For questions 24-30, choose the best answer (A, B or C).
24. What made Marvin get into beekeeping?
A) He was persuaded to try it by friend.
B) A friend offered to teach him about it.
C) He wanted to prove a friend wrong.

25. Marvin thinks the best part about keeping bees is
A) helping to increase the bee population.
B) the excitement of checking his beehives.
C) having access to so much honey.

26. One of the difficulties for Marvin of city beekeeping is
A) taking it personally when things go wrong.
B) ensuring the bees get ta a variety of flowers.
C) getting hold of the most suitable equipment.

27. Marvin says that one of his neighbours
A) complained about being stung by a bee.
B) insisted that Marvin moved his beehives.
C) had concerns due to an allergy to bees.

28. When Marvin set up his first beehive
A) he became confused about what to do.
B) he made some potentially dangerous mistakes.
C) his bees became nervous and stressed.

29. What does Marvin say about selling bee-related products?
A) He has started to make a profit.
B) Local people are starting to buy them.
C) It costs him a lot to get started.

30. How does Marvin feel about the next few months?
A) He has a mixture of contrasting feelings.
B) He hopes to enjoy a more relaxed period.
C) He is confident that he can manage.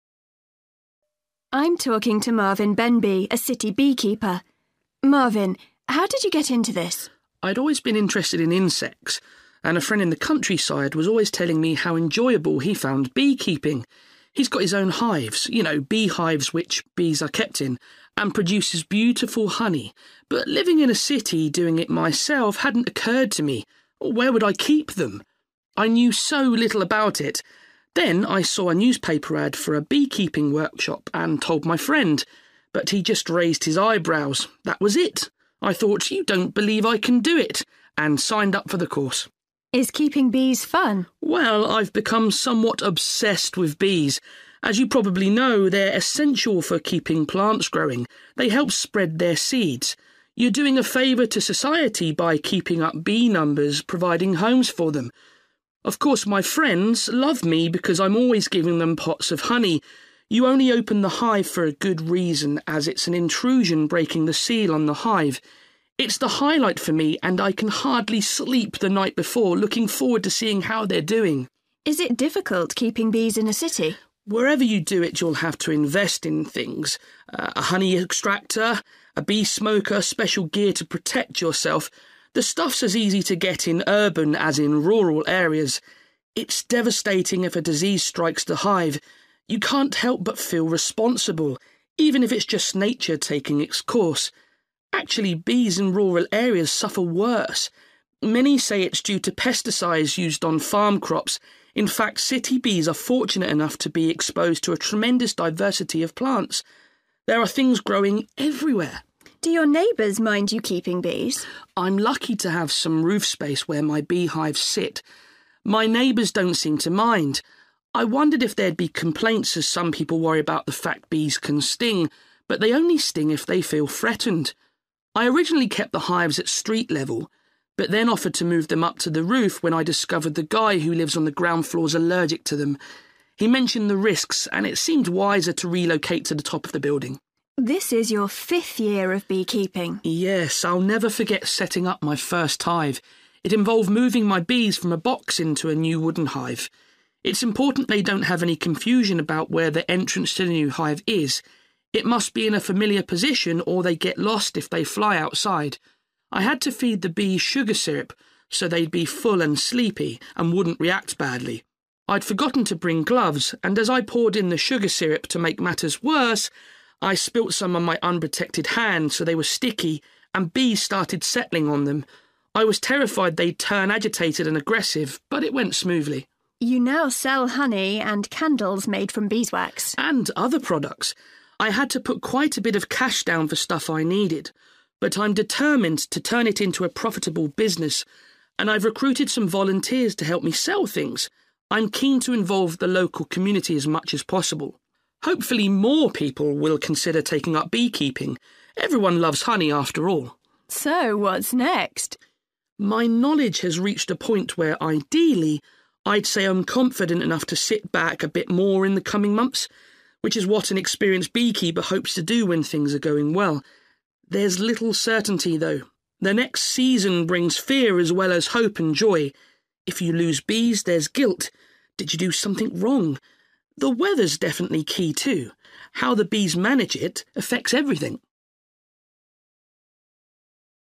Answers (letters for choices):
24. C
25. B
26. A
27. C
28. B
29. C
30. A

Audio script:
Interviewer: I'm talking to Marvin Benby, a city beekeeper. Marvin, how did you get into this?
Marvin: I'd always been interested in insects, and a friend in the countryside was always telling me how enjoyable he found beekeeping. He's got his own hives, you know, beehives, which bees are kept in, and produces beautiful honey, but living in a city, doing it myself hadn't occurred to me – where would I keep them? I knew so little about it. Then I saw a newspaper ad for a beekeeping workshop, and told my friend ... but he just raised his eyebrows. That was it – I thought 'you don't believe I can do it', and signed up for the course.
Interviewer: Is keeping bees fun?
Marvin: Well, I've become somewhat obsessed with bees. As you probably know, they're essential for keeping plants growing. They help spread their seeds. You're doing a favour to society by keeping us bee numbers, providing homes for them. Of course, my friends love me because I'm always giving them pots of money. You only open the hive for a good reason, as it's an intrusion breaking the seal on the hive. It's the highlight for me and I can hardly sleep the night before – looking forward to seeing how they're doing.
Interviewer: Is it difficult keeping bees in a city?
Marvin: Wherever you do it you'll have to invest in things – a honey extractor, a bee smoker, special gear to protect yourself – the stuff's as easy to get in urban as in rural areas. It's devastating if a disease strikes the hive – you can't help but feel responsible, even if it's just nature taking its course. Actually bees in rural areas suffer worse – many say it's due to pesticides used on farm crops. In fact city bees are fortunate enough to be exposed to a tremendous diversity of plants. There are things growing everywhere.
Interviewer: Do your neighbours mind you keeping bees?
Marvin: I'm lucky to have some roof space where my beehives sit – my neighbours don't seem to mind. I wondered if there'd be complaints as some people worry about the fact bees can sting. But they only sting if they feel threatened. I originally kept the hives at street level, but then offered to move them up to the roof when I discovered the guy who lives on the ground floor's allergic to them. He mentioned the risks and it seemed wiser to relocate to the top of the building.
Interviewer: This is your fifth year of beekeeping ...
Marvin: Yes ... I'll never forget setting up my first hive. It involved moving my bees from a box into a new wooden hive. It's important they don't have any confusion about where the entrance to the new hive is – it must be in a familiar position or they get lost if they fly outside. I had to feed the bees sugar syrup, so they'd be full and sleepy, and wouldn't react badly. I'd forgotten to bring gloves, and as I poured in the sugar syrup, to make matters worse, I spilt some on my unprotected hands, so they were sticky, and bees started settling on them. I was terrified they'd turn agitated and aggressive, but it went smoothly.
Interviewer: You now sell honey and candles made from beeswax ...
and other products. I had to put quite a bit of cash down for stuff I needed, but I'm determined to turn it into a profitable business, and I've recruited some volunteers to help me sell things. I'm keen to involve the local community as much as possible ... hopefully more people will consider taking up beekeeping – everyone loves honey after all!
Interviewer: So, what's next ...?
Marvin: My knowledge has reached a point where ideally I'd say I'm confident enough to sit back a bit more in the coming months, which is what an experienced beekeeper hopes to do when things are going well. There's little certainly though ... the next season brings fear as well as hope and joy ... if you lose bees, there's guilt, did you do something wrong? The weather's definitely key too – how the bees manage it affects everything.